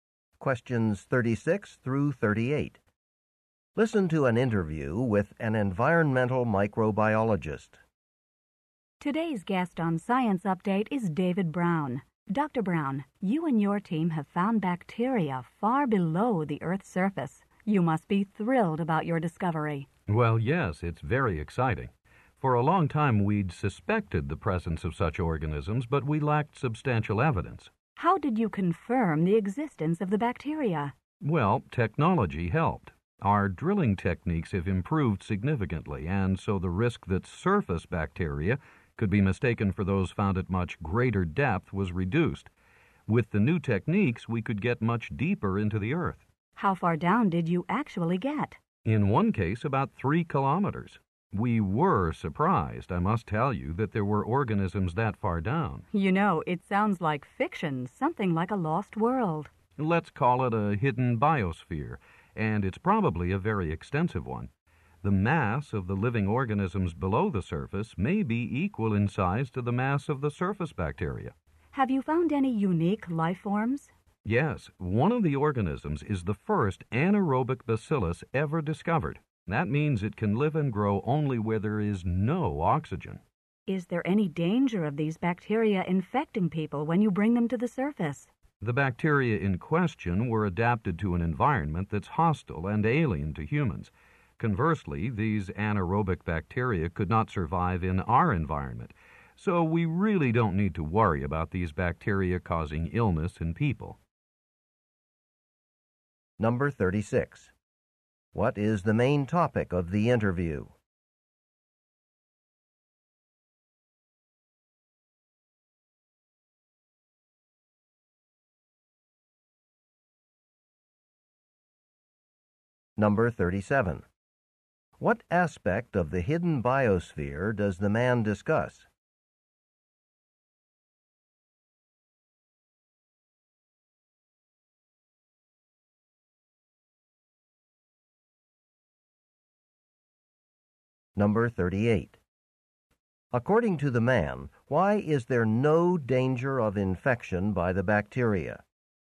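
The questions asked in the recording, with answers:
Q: What is the main topic of the interview?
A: The discovery of bacteria deep below the Earth's surface

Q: According to the man, why is there no danger of infection by the bacteria?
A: The bacteria cannot survive in an environment with oxygen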